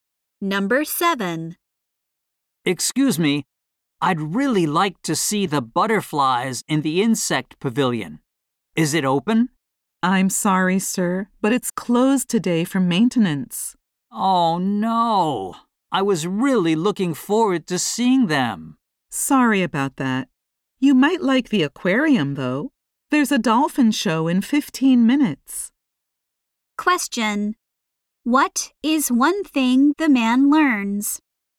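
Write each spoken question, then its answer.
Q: What is one thing the man learns?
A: The insect pavilion is closed today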